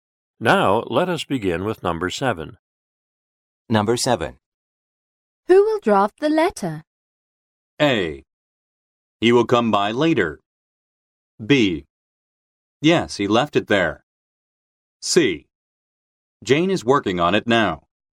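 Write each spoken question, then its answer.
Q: Who will draft the letter?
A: C: Jane is working on it now.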